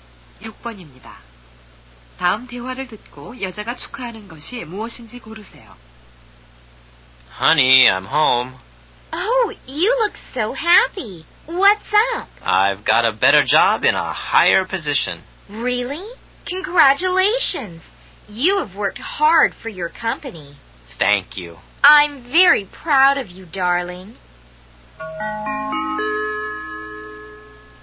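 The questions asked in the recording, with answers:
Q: 다음 대화를 듣고 여자가 축하하는 것이 무엇인지 고르세요.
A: 남자의 승진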